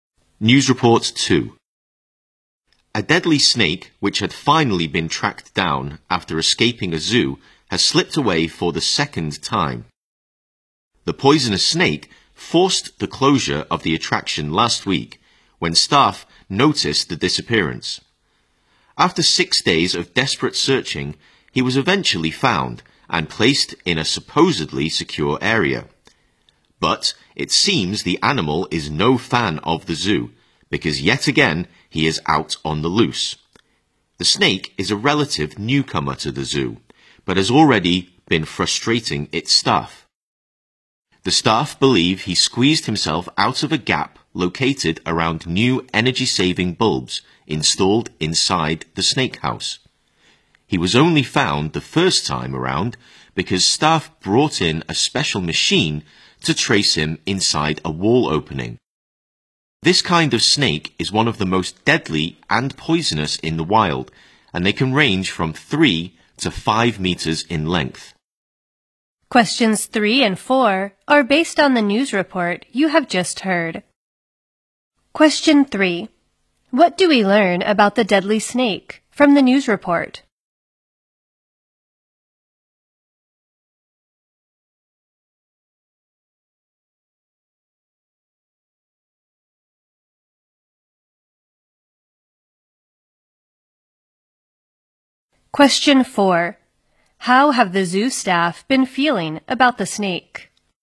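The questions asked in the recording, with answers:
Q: What do we learn about the deadly snake from the news report?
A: It escaped again after being found

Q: How have the zoo staff been feeling about the snake?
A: Frustrated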